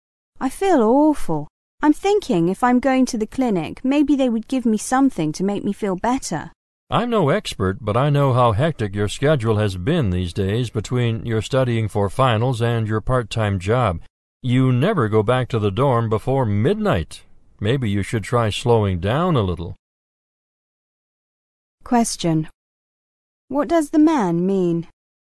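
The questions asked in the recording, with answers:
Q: What does the man mean?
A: The woman is overworked and should slow down.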